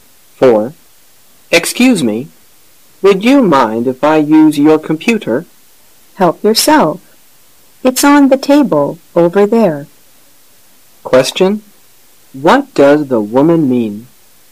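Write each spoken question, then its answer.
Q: What does the woman mean?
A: The man may use her computer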